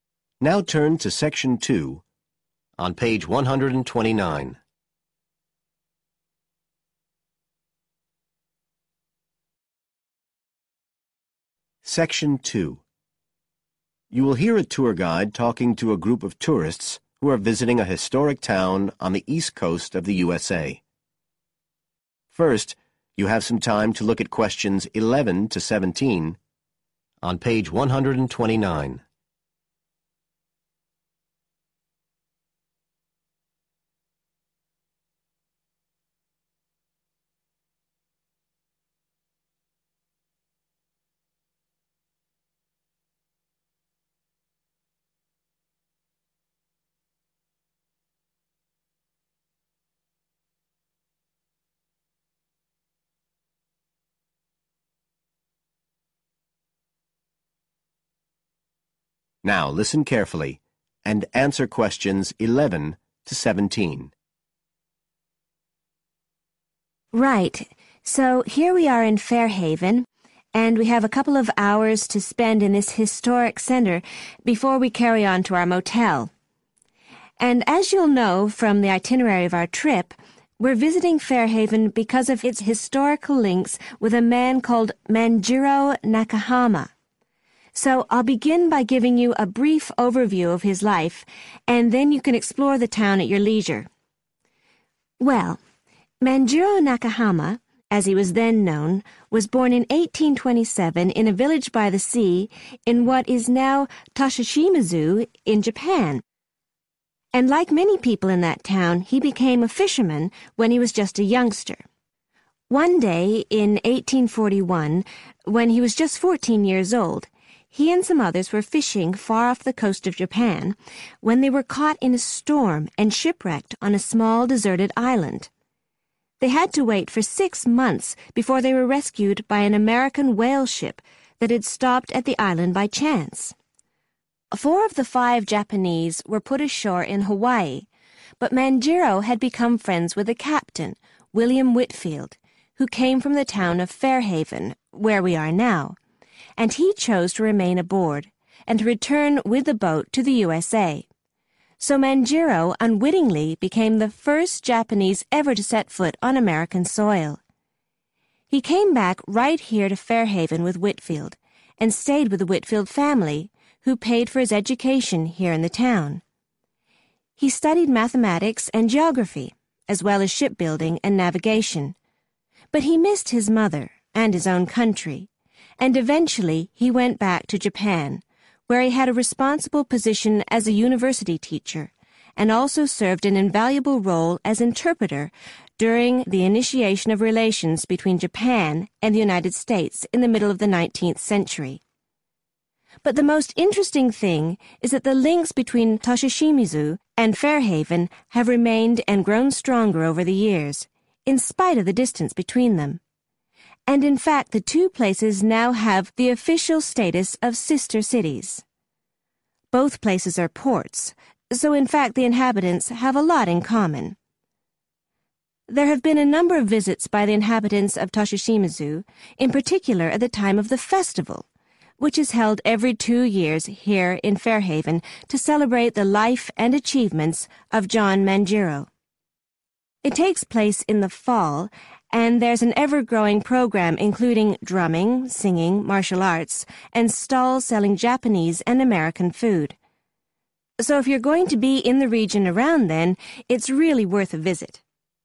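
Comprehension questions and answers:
Complete the sentences below. Write NO MORE THAN TWO WORDS AND/ OR A NUMBER for each answer.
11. Manjiro started work as a when he was still a young boy.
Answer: fisherman

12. He spent on a deserted island before he was rescued.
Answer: 6 months

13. He became friends with William Whitefield who was a ship's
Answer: captain

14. The cost of Manjiro's in America was covered by the Whitefield family.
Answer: education

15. Manjiro eventually returned to Japan, where he carried out important work as a teacher and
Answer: interpreter

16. Fairhaven and Tosashimizu are now officially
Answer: sister cities

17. Every two years, the John Manjiro is held in Fairhaven.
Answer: festival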